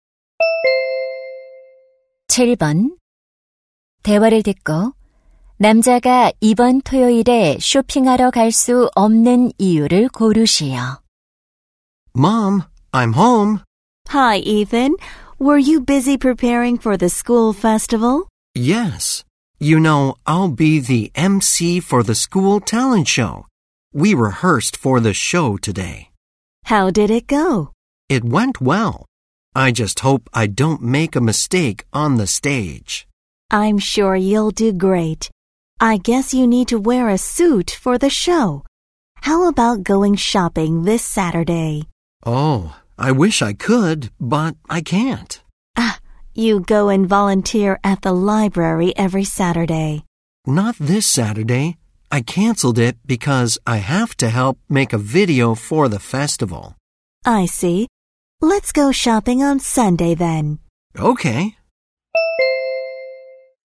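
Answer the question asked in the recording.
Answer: 축제 영상 제작을 도와야 해서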